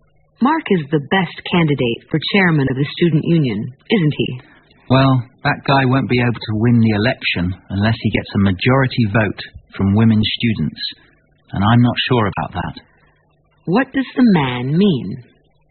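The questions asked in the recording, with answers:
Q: What does the man mean?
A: He isn't sure Mark will win, because Mark needs most of the women students' votes.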